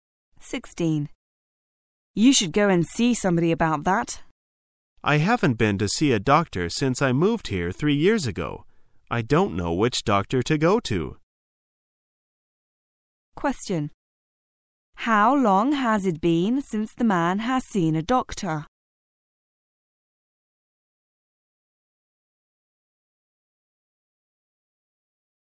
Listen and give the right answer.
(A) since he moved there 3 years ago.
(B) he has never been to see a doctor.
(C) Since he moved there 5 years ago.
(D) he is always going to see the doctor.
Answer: (A) since he moved there 3 years ago.

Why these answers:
此题考查听细节的能力。解题关键在于听到"I haven't been to see a doctor since I moved here three years ago.",意为"自从我三年前搬到这里以来从没看过病"。

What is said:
A
[解析] W: You should go and see somebody about that. M: I haven't been to see a doctor since I moved here three years ago. I don't know which doctor to go to. Q: How long has it been since the man has seen a doctor?